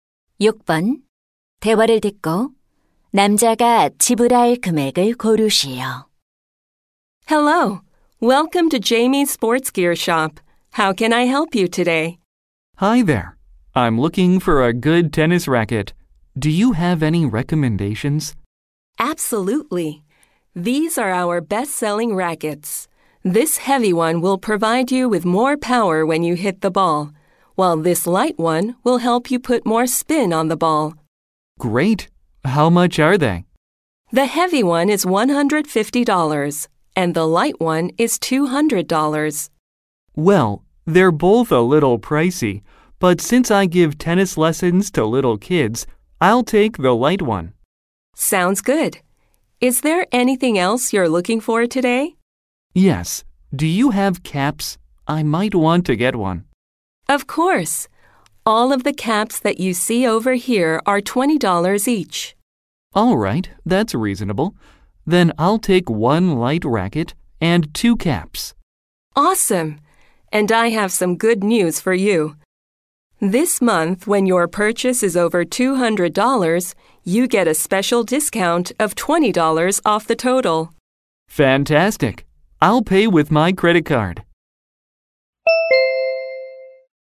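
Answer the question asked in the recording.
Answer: $220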